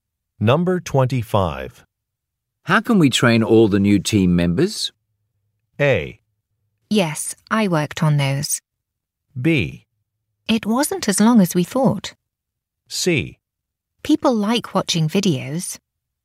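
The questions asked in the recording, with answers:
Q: How can we train all the new team members?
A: C: People like watching videos.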